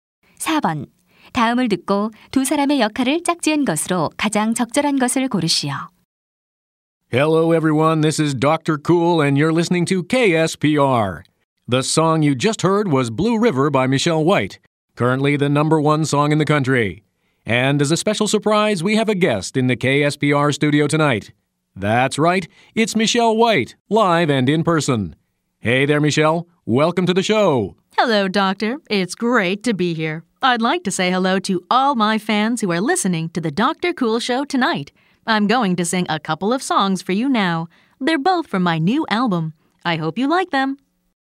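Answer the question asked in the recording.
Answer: 라디오 진행자 - 가수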